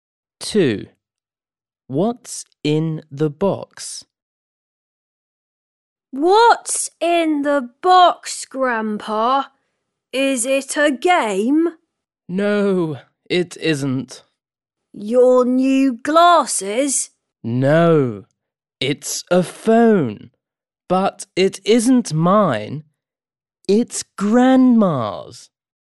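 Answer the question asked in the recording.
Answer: a phone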